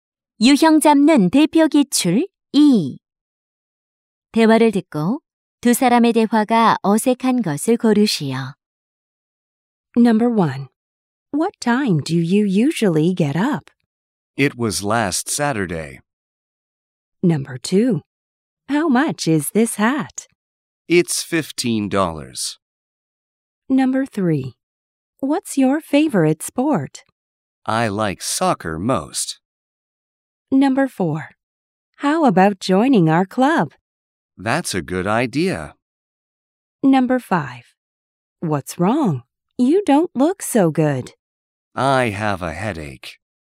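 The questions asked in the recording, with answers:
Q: 대화를 듣고 두 사람의 대화가 어색한 것을 고르시오.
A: 1: What time do you usually get up? / It was last Saturday.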